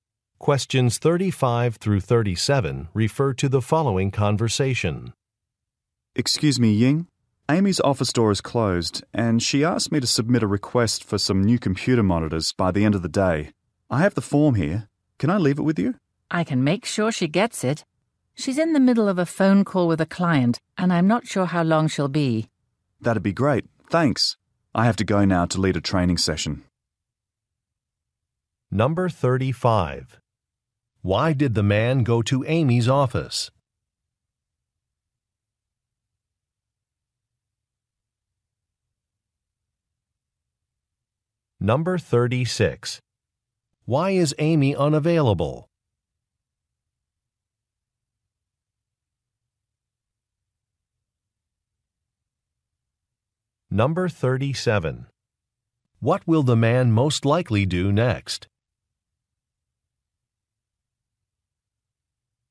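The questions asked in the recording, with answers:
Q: Why did the man go to Amy's office?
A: To submit a request for new computer monitors

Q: Why is Amy unavailable?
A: She is on a phone call with a client

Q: What will the man most likely do next?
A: Lead a training session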